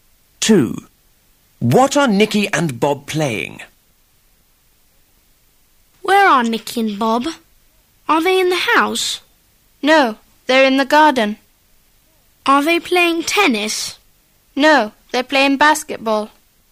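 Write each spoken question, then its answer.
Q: What are Nicky and Bob playing?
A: Basketball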